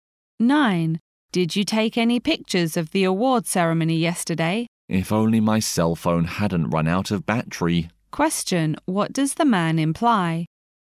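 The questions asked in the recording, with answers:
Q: What does the man imply?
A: He didn't take any pictures because his phone battery ran out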